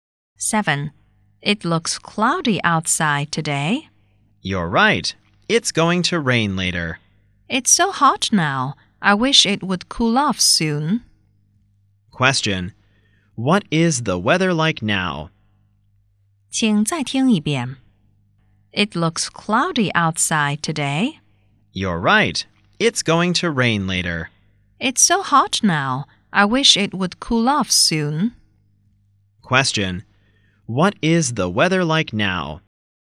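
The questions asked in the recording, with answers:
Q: Question.What is the weather like now?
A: Hot and cloudy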